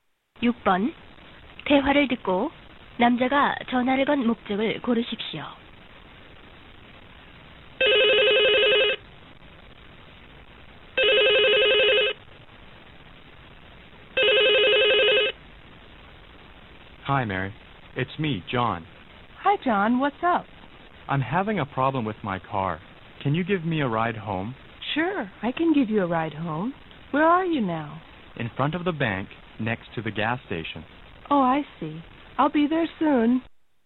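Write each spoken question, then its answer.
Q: 6번 대화를 듣고 남자가 전화를 건 목적을 고르십시오.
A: 집까지 차를 태워 달라고 부탁하려고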